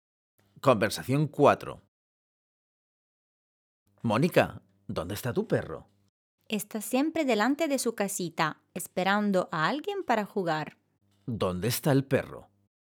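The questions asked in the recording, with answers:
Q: ¿Dónde está el perro?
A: Delante de su casita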